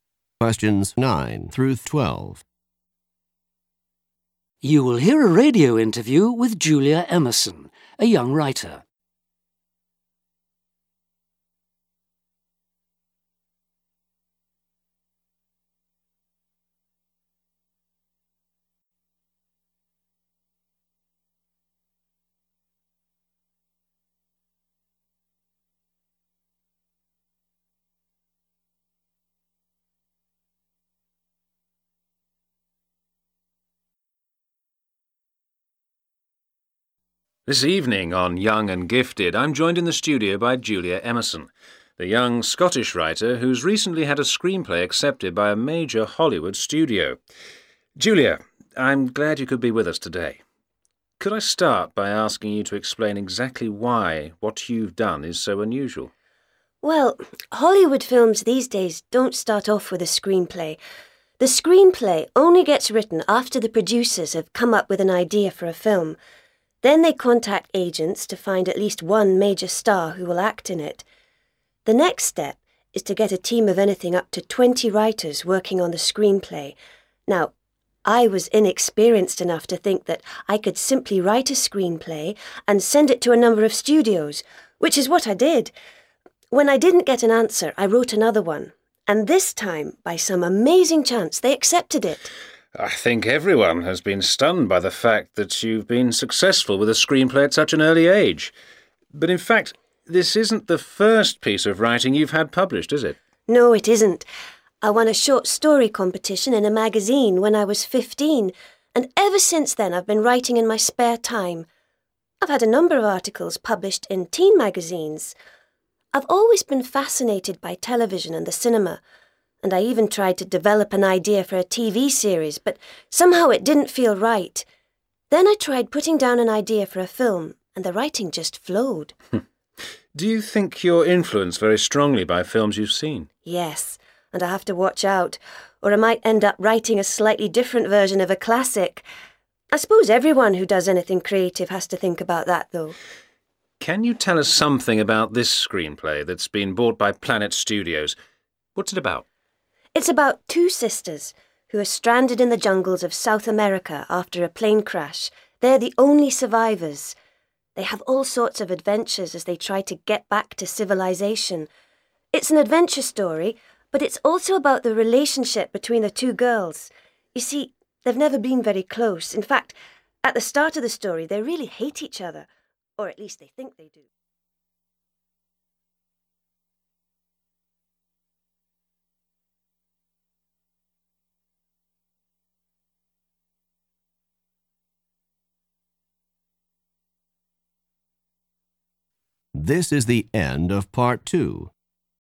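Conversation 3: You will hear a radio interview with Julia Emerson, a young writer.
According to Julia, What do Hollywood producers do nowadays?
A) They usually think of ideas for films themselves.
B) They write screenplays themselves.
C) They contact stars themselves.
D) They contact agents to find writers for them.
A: They usually think of ideas for films themselves.

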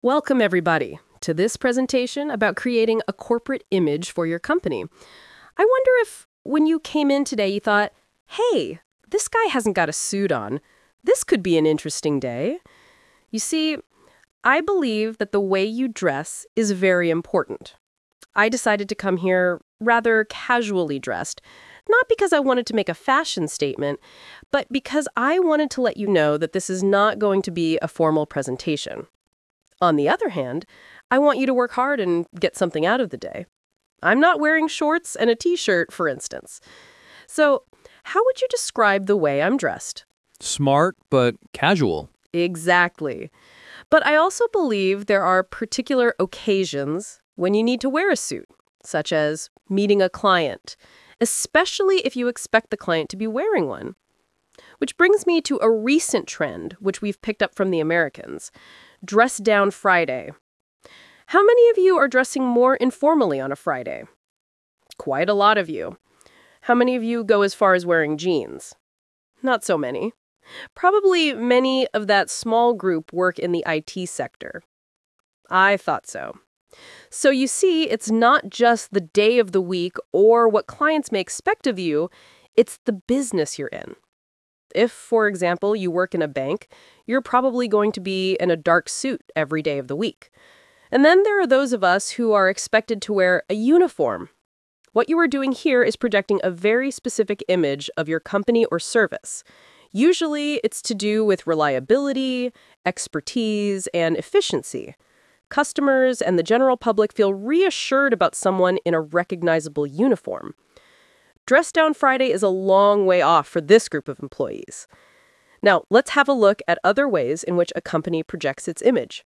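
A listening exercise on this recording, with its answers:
Talk/Lecture 1: You will hear a presentation about fashion at work.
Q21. The presenter doesn't wear a suit because ...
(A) He is not an important person.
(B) He wants to talk about different fashion trend.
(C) The presentation is not formal.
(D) He works for a fashion company.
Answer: The presentation is not formal.

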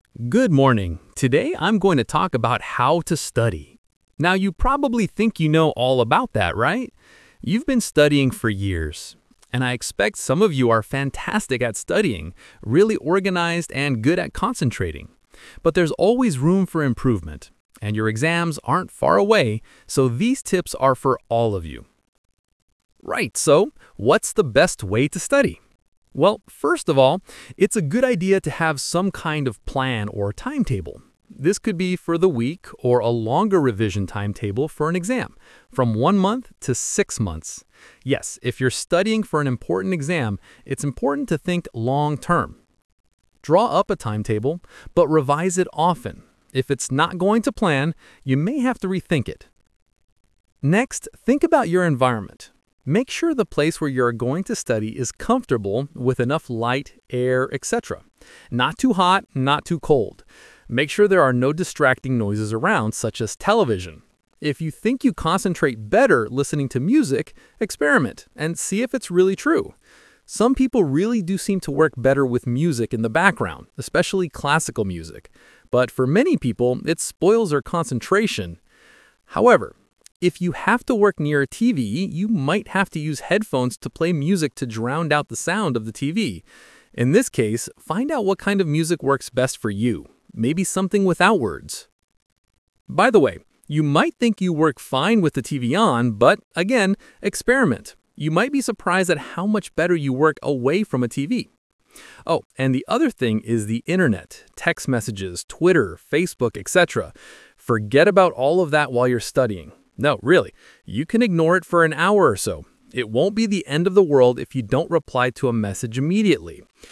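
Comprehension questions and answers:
Talk/Lecture 2: You will hear a talk about how to study.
Some of you are probably fantastic at studying, really organized and ....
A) good at concentrating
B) well improved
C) worried of the exam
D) intelligent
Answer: good at concentrating

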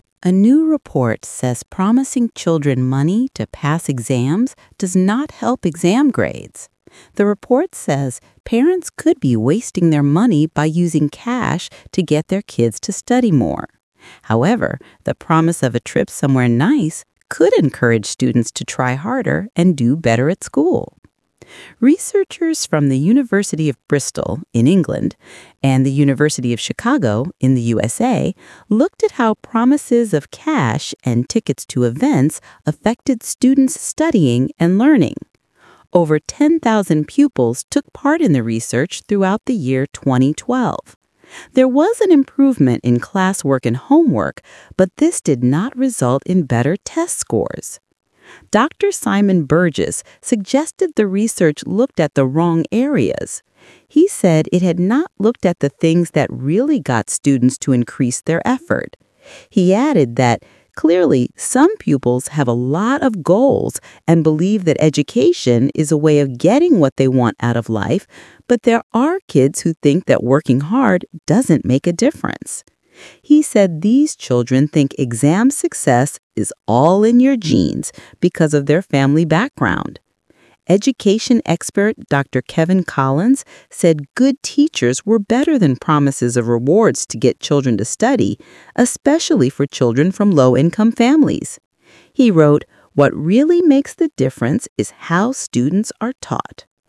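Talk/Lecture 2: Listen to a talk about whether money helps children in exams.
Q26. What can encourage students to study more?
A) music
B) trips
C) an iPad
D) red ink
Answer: trips

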